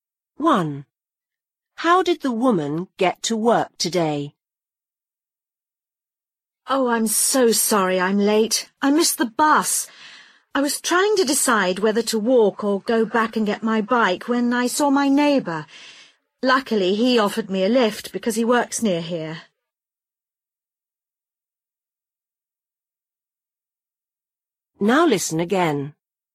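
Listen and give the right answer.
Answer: By car; her neighbour gave her a lift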